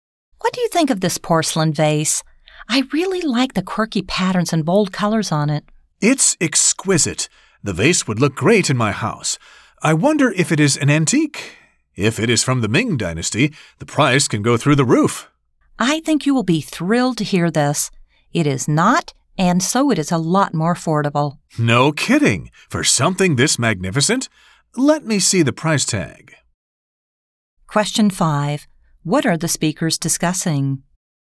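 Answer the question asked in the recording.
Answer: A porcelain vase (its looks and price)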